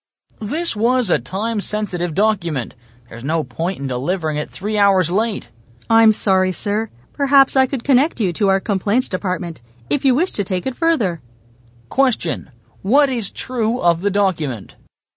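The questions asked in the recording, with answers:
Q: what is true of the document?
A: It was time-sensitive and delivered 3 hours late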